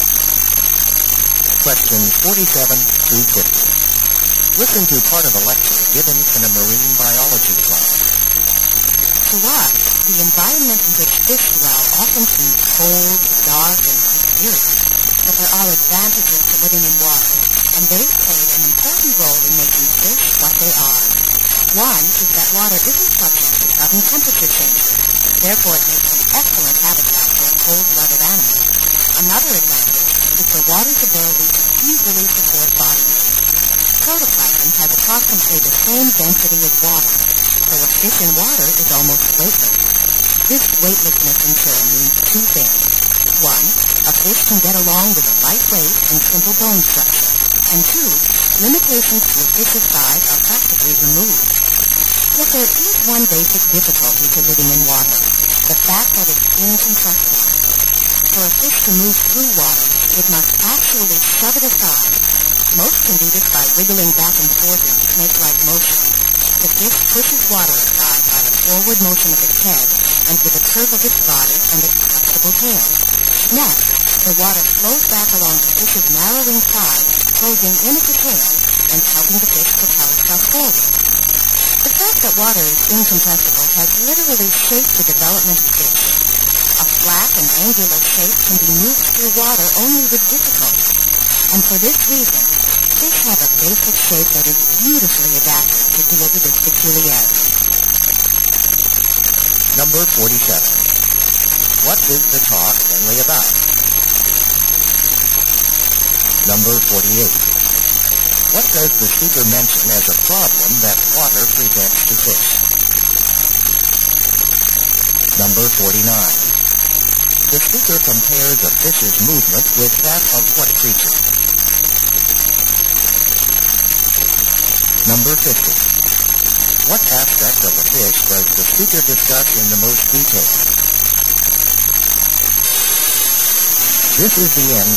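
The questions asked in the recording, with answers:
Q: What is the talk mainly about?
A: How living in water has shaped fish

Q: What does the speaker mention as a problem that water presents to fish?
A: Water is incompressible

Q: The speaker compares a fish's movement with that of what creature?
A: A snake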